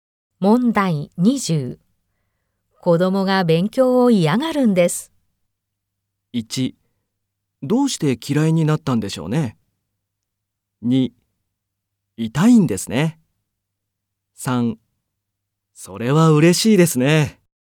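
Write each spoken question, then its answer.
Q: 子供が勉強を嫌がるんです。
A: 1: どうして嫌いになったんでしょうね。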